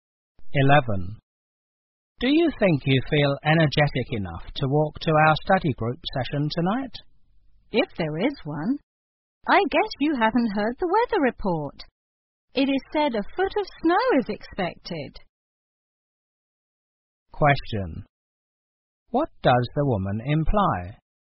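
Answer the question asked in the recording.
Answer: The study group session may be canceled because of heavy snow.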